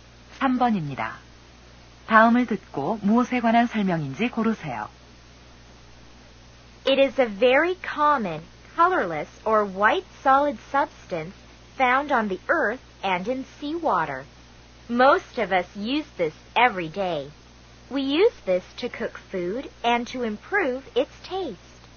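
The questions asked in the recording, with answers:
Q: 다음을 듣고 무엇에 관한 설명인지 고르세요.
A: 소금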